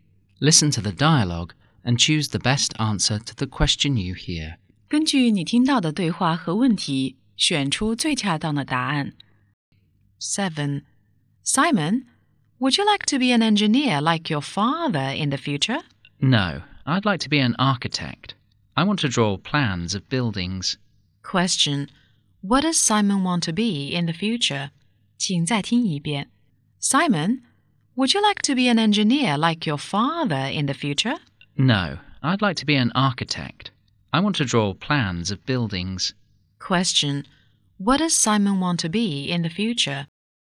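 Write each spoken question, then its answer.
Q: What does Simon want to be in the future?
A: An architect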